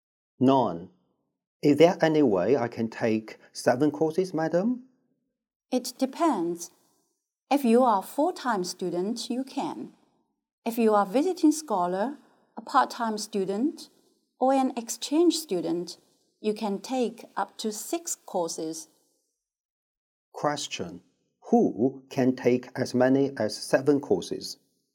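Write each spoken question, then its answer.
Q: Who can take as many as 7 courses?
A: Full-time students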